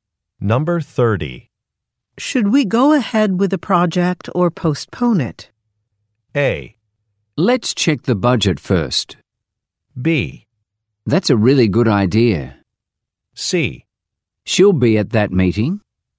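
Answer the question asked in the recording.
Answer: A: Let's check the budget first.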